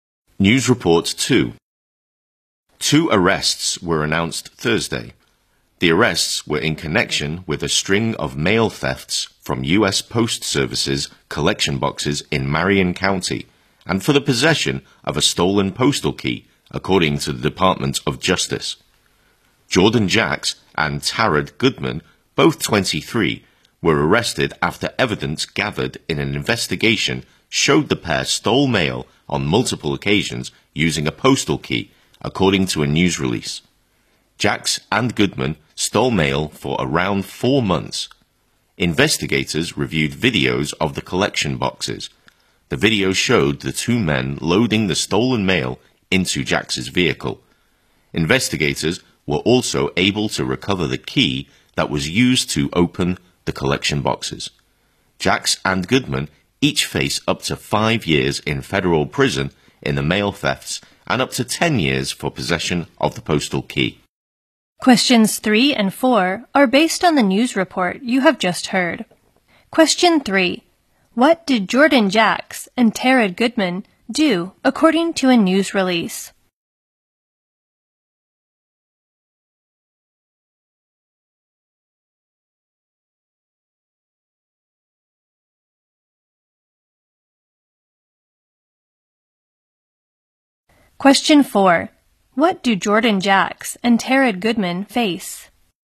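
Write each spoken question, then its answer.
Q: What did Jordan Jacks and Tarad Goodman do according to a news release?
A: They stole mail from postal collection boxes many times using a postal key.

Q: What do Jordan Jacks and Tarad Goodman face?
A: Up to 5 years in federal prison for the mail thefts and up to 10 years for having the postal key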